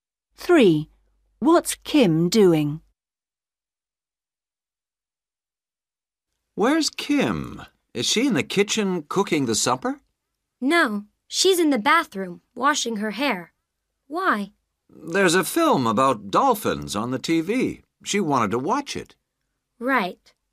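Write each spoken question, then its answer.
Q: What's Kim doing?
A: washing her hair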